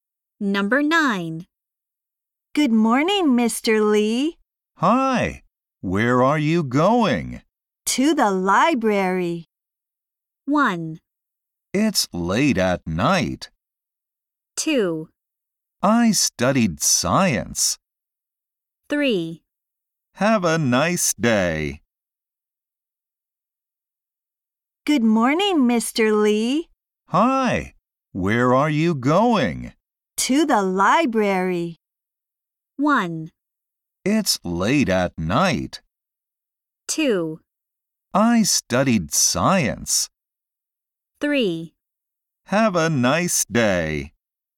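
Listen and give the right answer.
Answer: 3: Have a nice day.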